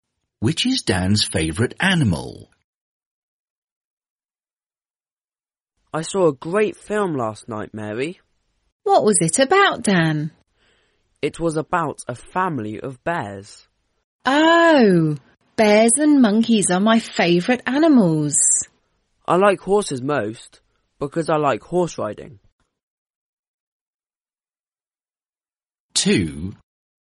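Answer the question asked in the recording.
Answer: horses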